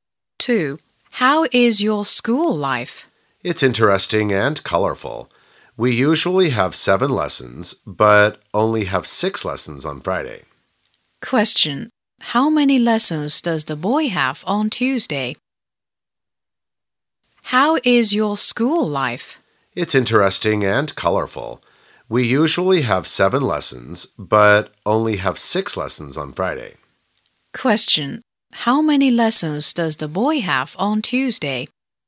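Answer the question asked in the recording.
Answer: Seven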